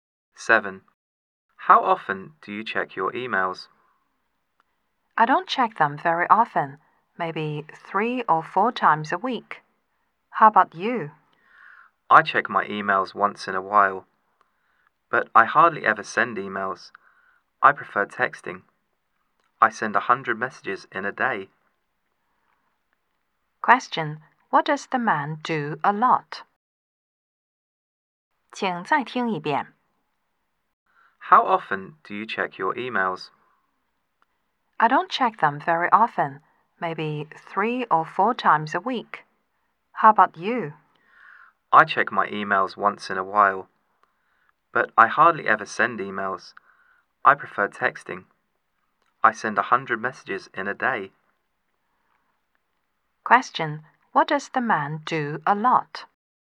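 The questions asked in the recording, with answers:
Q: what does the man do a lot?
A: He sends text messages.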